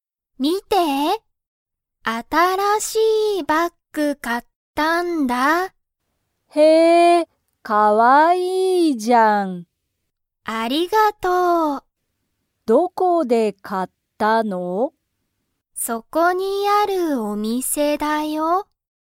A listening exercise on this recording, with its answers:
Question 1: 新(あたら)しいバッグは____。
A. 安(やす)い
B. 高(たか)い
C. おいしい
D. かわいい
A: D. かわいい

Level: Level 1

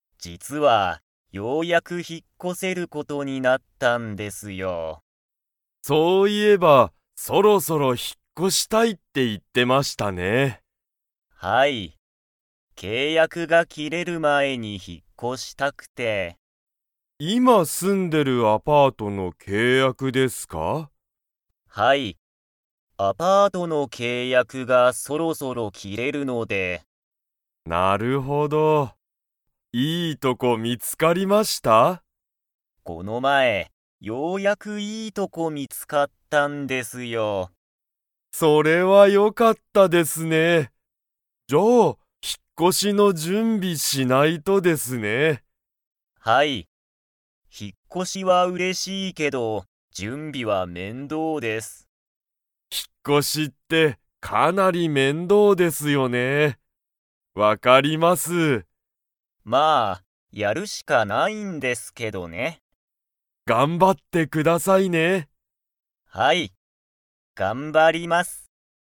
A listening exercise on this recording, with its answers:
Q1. 戸田とださんが今いま住すんでいるアパートの契約けいやくは、そろそろ切きれそうですか?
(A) はい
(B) いいえ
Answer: (A) はい

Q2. 戸田とださんは、引ひっ越こしは嬉うれしいけれど は面倒めんどうだ。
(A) アパート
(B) 料理りょうり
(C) 準備じゅんび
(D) 仕事しごと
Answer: (C) 準備じゅんび

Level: Level 4

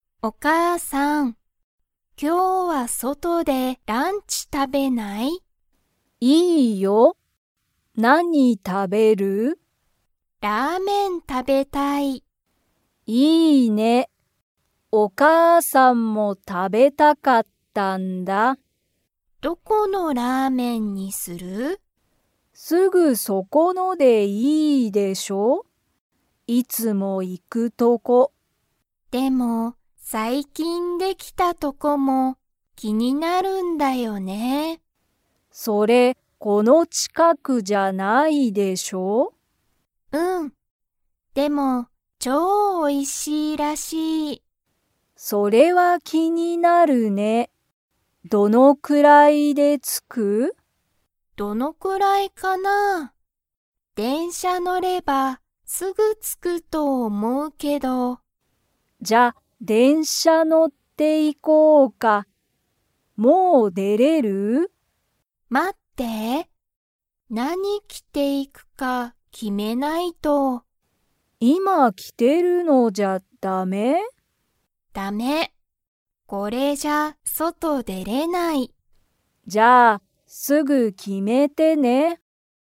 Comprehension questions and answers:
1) 二人ふたりは、すぐそこのラーメンのお店みせに 。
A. 行いく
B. 行いかない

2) 二人ふたりは、何なにに乗のって行いきますか?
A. 車くるま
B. 電車でんしゃ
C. バス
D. 自転車じてんしゃ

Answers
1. B. 行いかない
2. B. 電車でんしゃ

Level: Level 3

